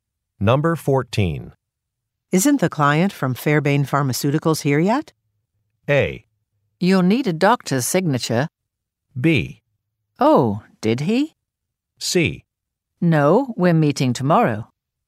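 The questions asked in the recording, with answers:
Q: Isn't the client from Fairbane Pharmaceuticals here yet?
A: C: No, we're meeting tomorrow.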